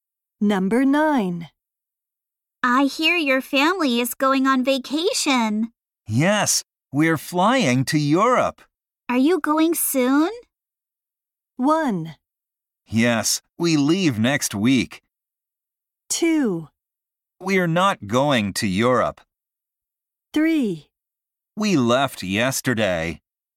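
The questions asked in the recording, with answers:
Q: Are you going soon?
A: 1: Yes, we leave next week.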